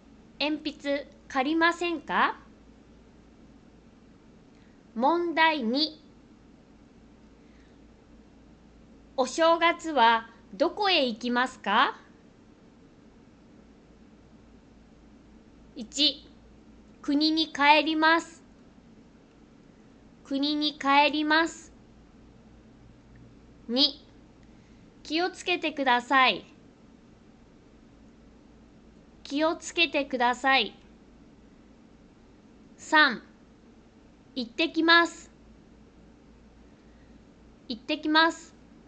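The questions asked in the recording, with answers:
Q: お正月はどこへ行きますか?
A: 1: 国に帰ります。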